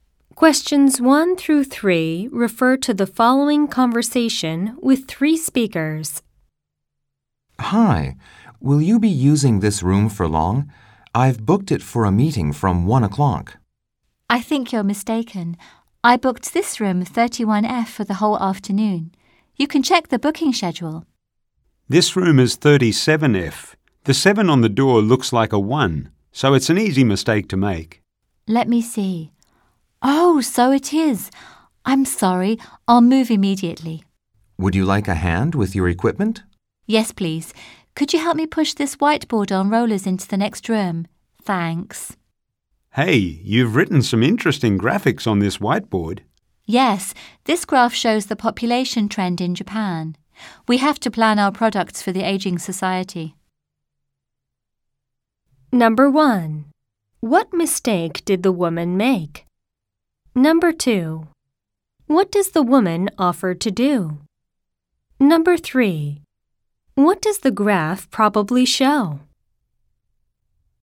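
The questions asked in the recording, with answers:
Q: What mistake did the woman make?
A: She went to the wrong room, mistaking room 37F for 31F.

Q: What does the graph probably show?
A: The population trend in Japan.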